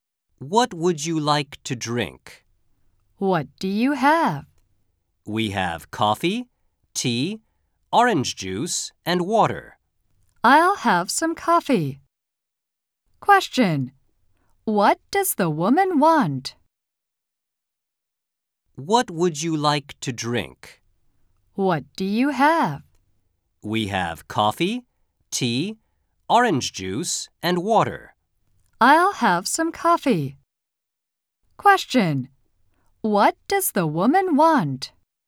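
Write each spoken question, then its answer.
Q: What does the woman want?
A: Coffee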